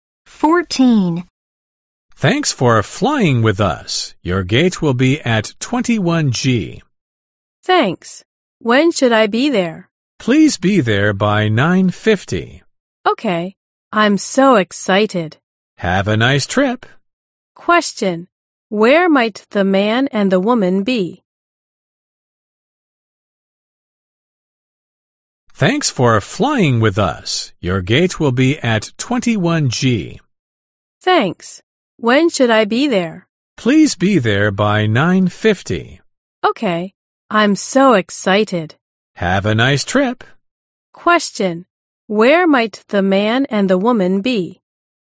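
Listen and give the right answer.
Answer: At an airport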